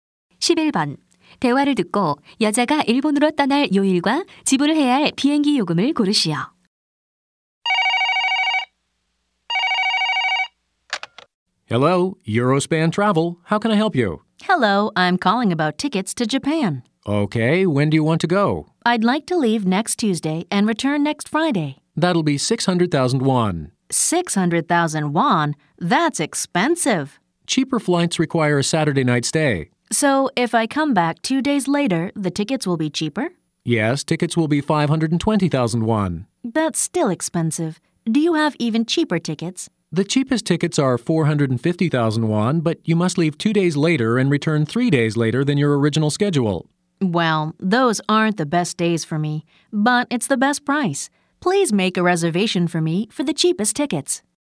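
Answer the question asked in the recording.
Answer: 목요일, 450,000원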